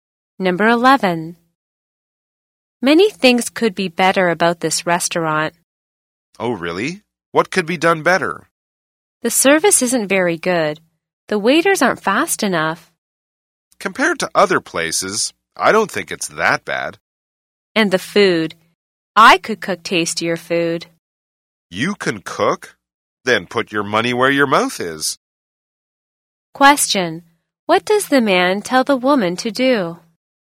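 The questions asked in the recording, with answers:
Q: What does the man tell the woman to do?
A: Prove she can cook tastier food (put her money where her mouth is)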